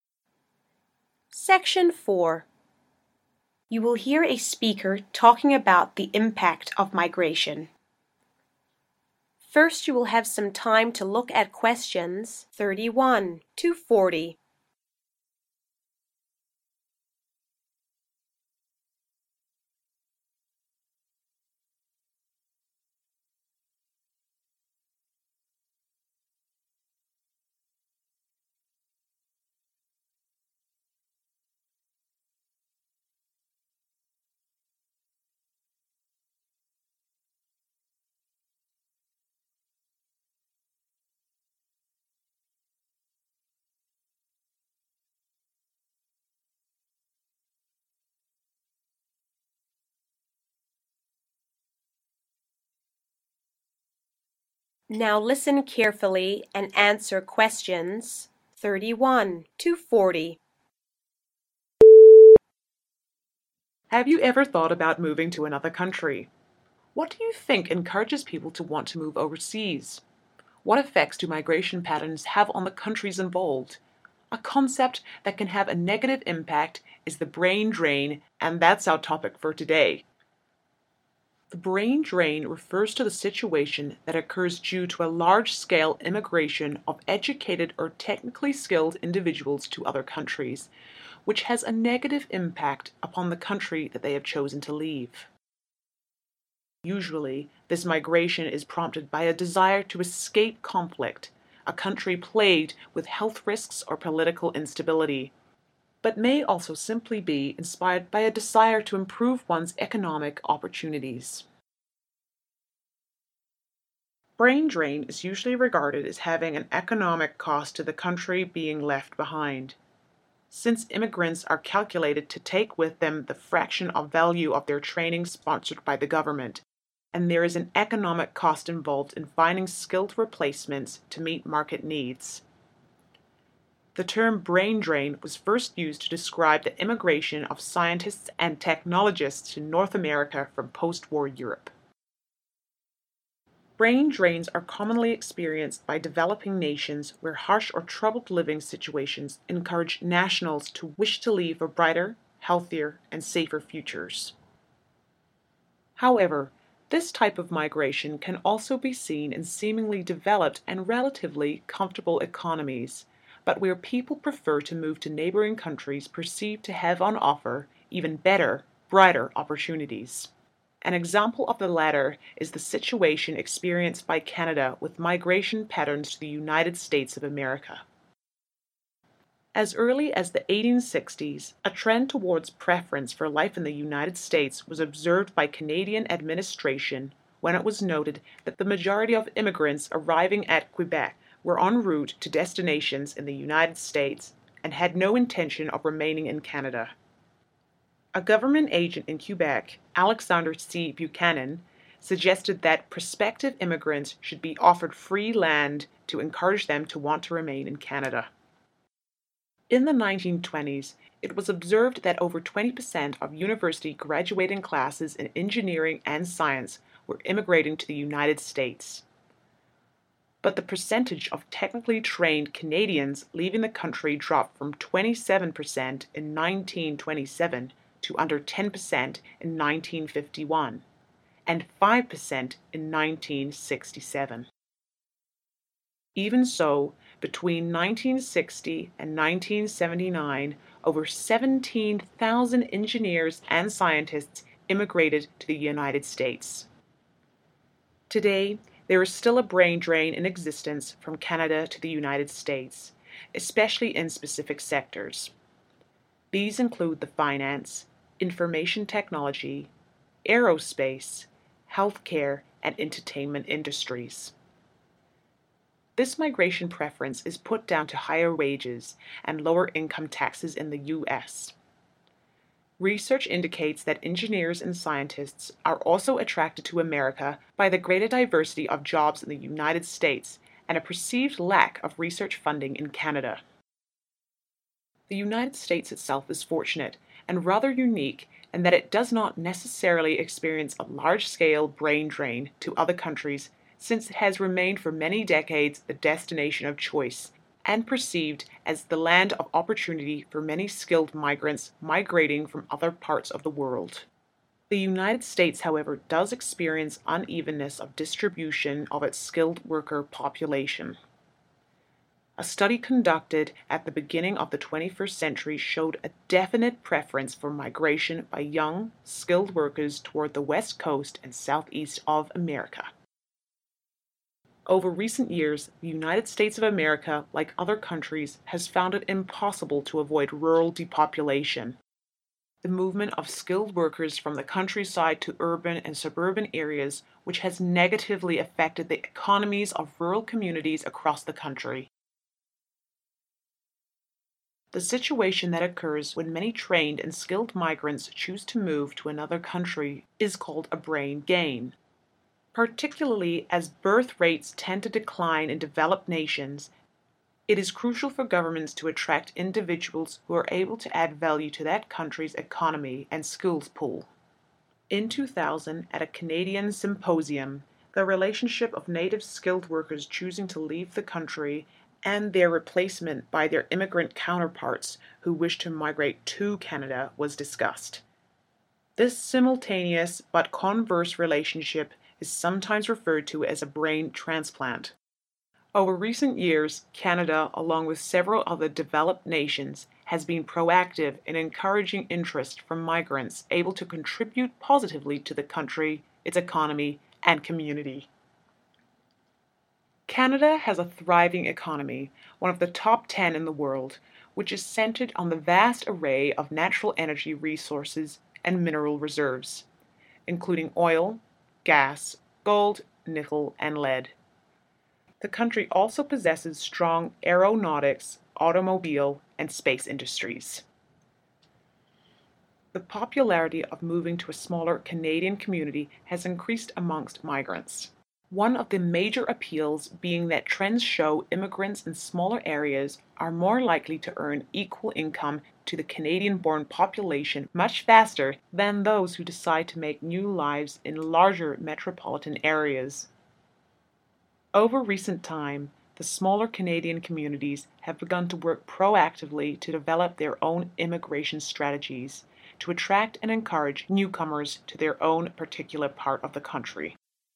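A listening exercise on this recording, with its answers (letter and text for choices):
Complete the summary below using NO MORE THAN ONE WORD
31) Brain drain occurs when technically skilled and/or 31. workers leave a particular country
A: educated

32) usually due to 32. instability, safety or health-related reasons.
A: political

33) Brain drain has a negative impact on the country the individuals leave due to the associated economic 33. .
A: cost

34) The term 'brain drain' was first used to describe migration from 34. to America after the war.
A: Europe

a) America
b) Canada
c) Neither America or Canada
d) Both America and Canada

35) Has experienced brain drain due to difficult living conditions.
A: c) Neither America or Canada

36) Incentives were offered to encourage early settlers to stay.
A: b) Canada

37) Brain drain activity decreased between the 1920s and the 1960s.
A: b) Canada

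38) Is thought to offer superior research opportunities.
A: a) America

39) The fall in what makes it even more important for governments to attract skilled migrants to their country?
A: birth rates

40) What is it easier for immigrants to smaller towns to earn than those in larger cities in relation to the domestic population?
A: equal income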